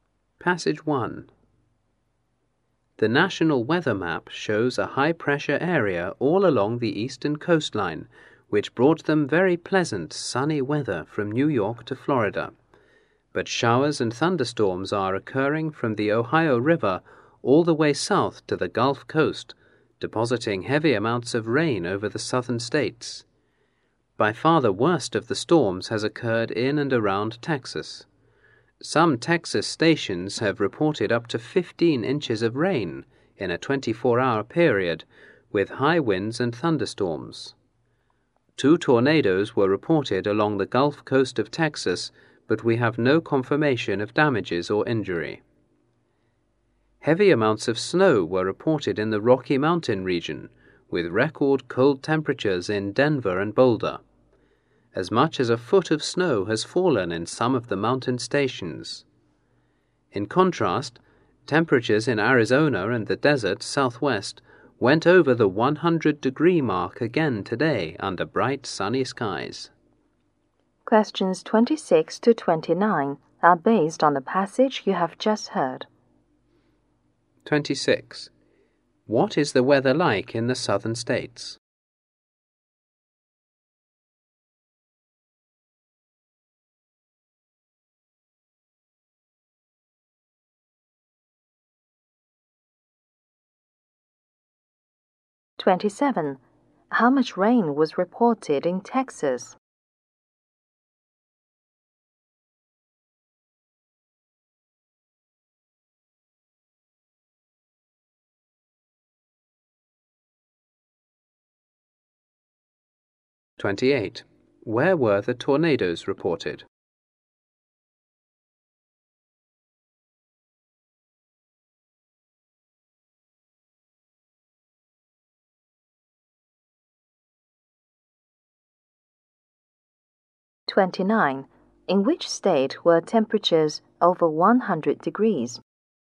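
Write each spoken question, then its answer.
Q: What is the weather like in the southern states?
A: Showers and thunderstorms with heavy rain.

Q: How much rain was reported in Texas?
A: Up to 15 inches in 24 hours.

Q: Where were the tornadoes reported?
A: Along the Gulf Coast of Texas.

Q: In which state were temperatures over 100 degrees?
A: Arizona.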